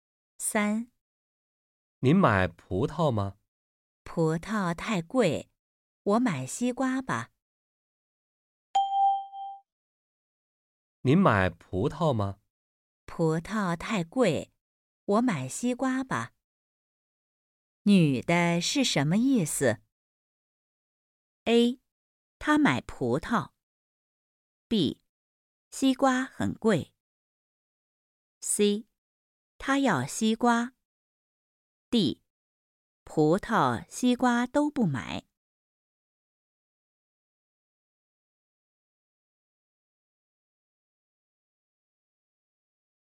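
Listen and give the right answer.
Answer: C: 她要西瓜。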